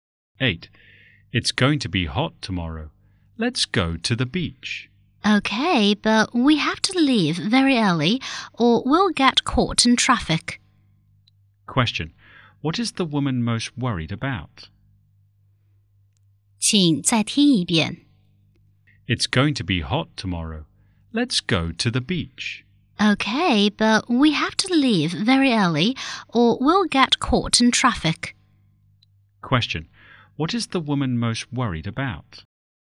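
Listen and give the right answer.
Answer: Getting caught in traffic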